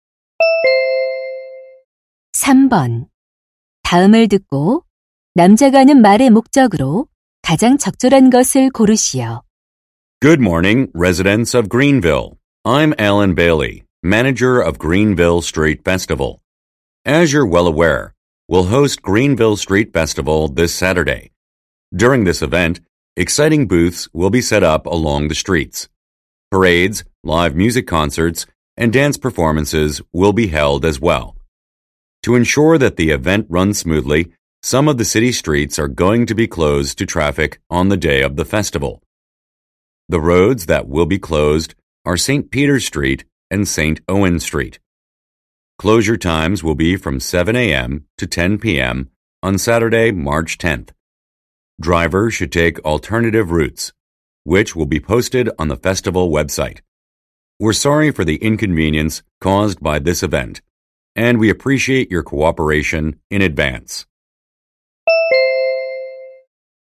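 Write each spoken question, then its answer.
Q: 다음을 듣고 남자가 하는 말의 목적으로 가장 적절한 것을 고르시오.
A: 축제 당일 도로 통제를 안내하려고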